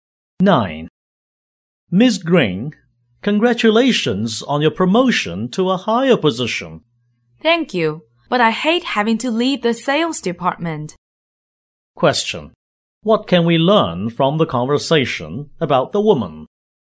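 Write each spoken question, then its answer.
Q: What can we learn from the conversation about the woman?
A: She was promoted but is sorry to leave the sales department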